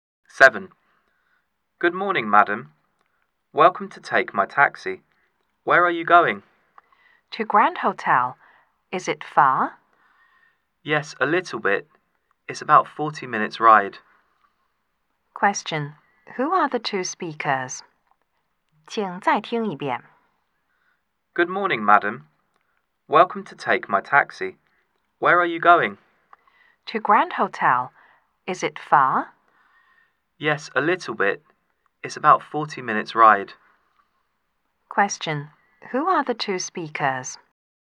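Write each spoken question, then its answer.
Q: Who are the two speakers?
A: A taxi driver and a passenger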